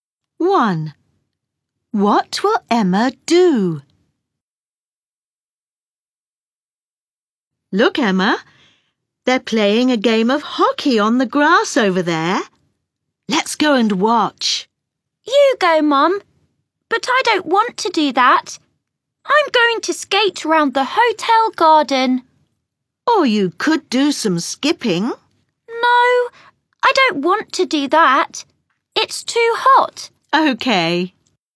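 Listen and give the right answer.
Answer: skate round the hotel garden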